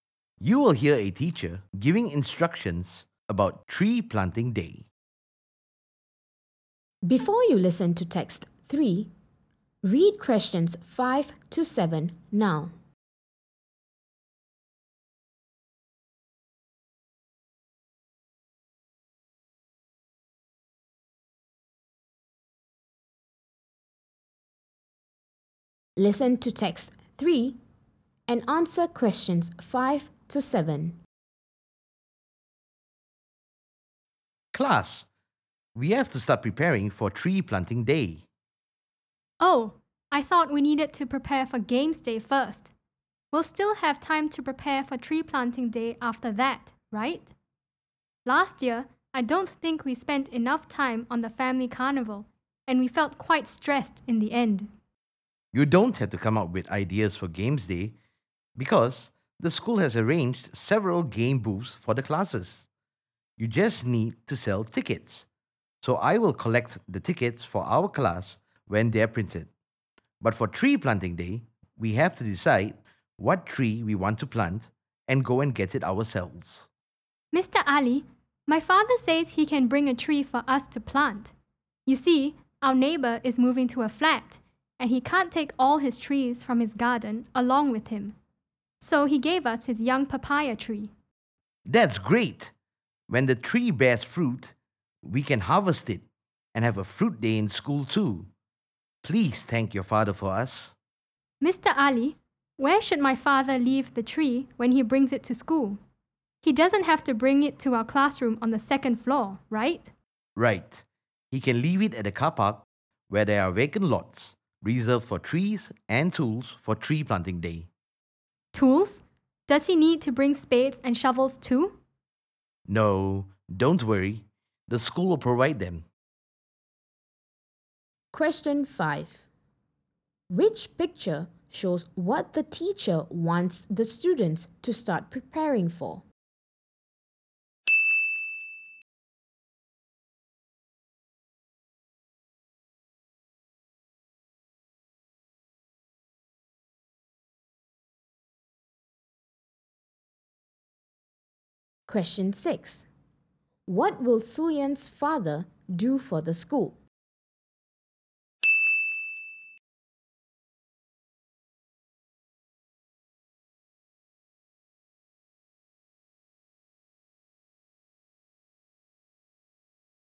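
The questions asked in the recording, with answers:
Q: What will Suyan's father do for the school?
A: Bring a young papaya tree for the class to plant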